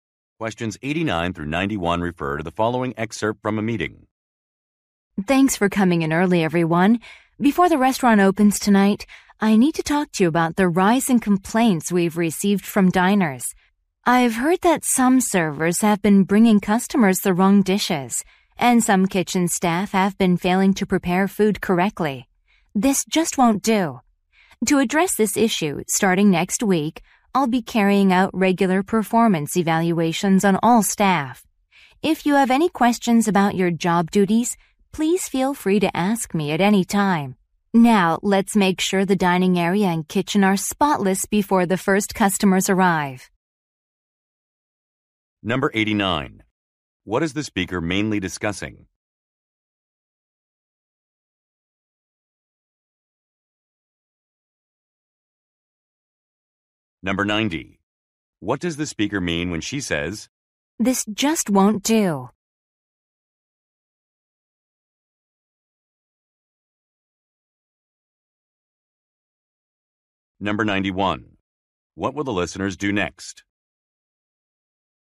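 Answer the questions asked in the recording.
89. An increase in customer complaints
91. Clean the dining area and kitchen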